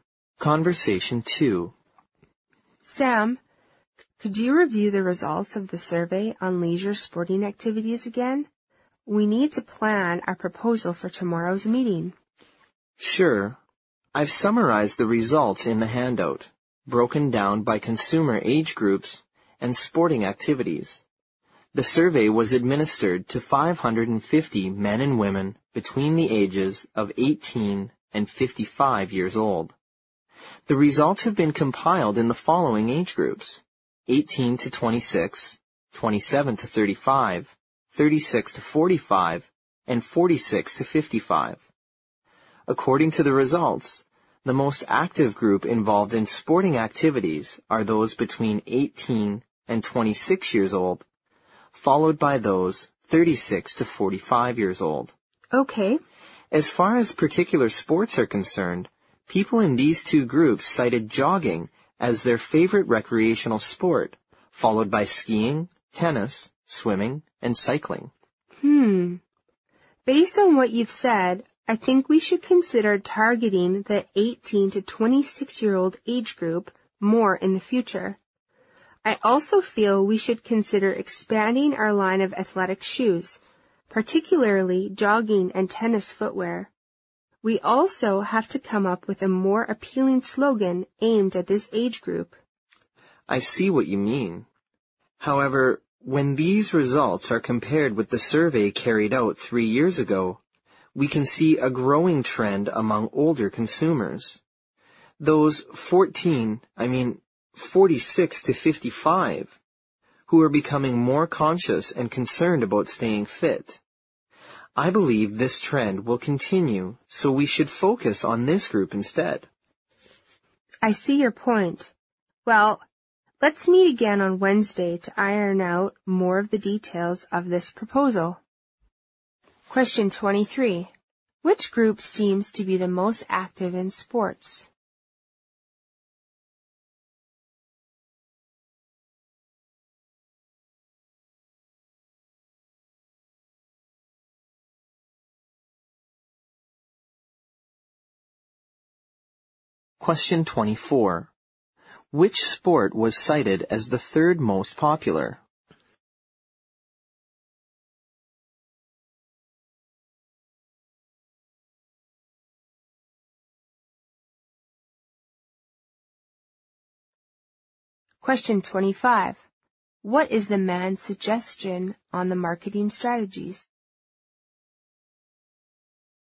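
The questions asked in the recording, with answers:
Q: Which group seems to be the most active in sports?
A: Those between 18 and 26 years old

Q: Which sport was cited as the third most popular?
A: Tennis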